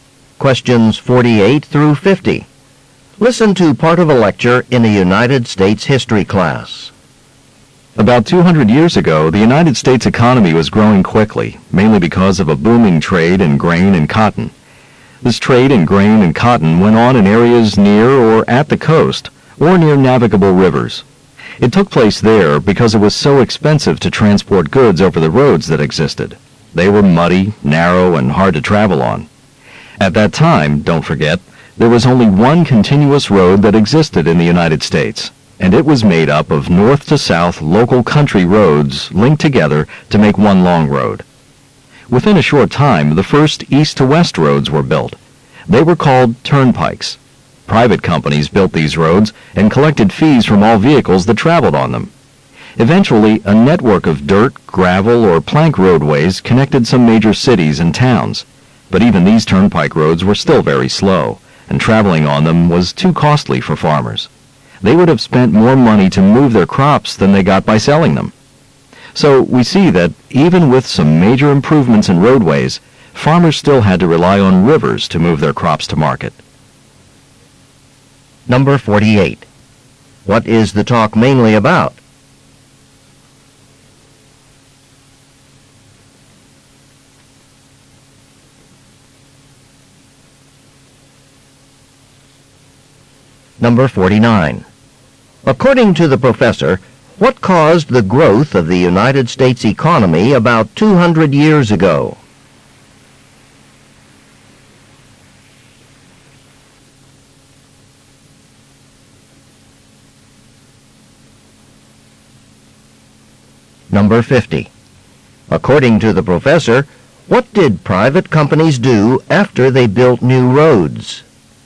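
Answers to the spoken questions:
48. Early US roads and transporting crops
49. Trade in grain and cotton
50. Collected fees from vehicles using them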